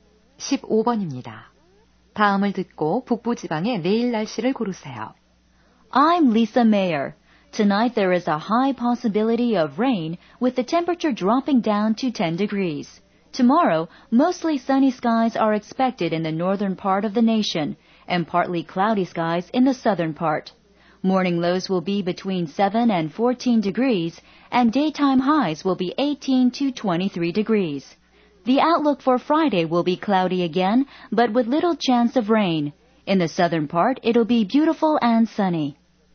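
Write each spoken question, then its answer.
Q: 다음을 듣고 북부 지방의 내일 날씨를 고르세요.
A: 대체로 맑음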